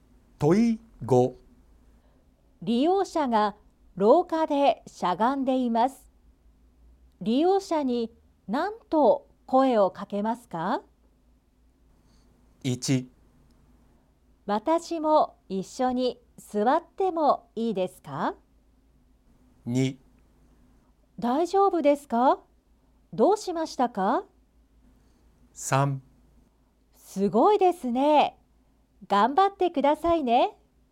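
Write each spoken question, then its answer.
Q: 利用者が廊下でしゃがんでいます。利用者に何と声をかけますか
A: 2: 大丈夫ですか?どうしましたか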